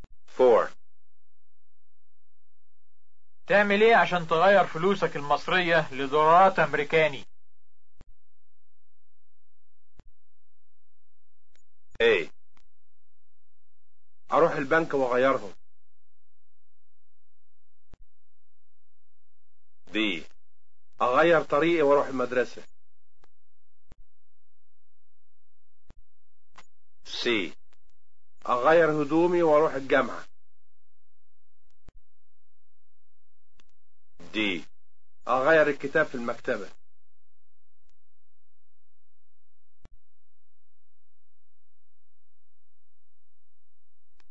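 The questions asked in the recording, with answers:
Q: تعمل ايه عشان تغير فلوسك المصرية لدولارات امريكاني؟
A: A: اروح البنك واغيرهم.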